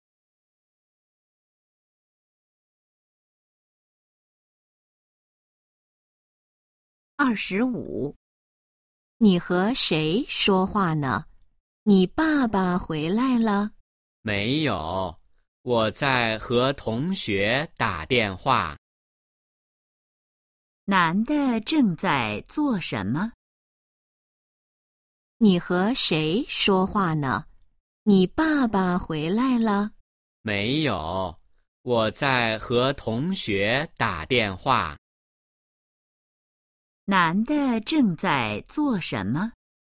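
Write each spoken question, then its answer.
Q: 男的正在做什么?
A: 和同学打电话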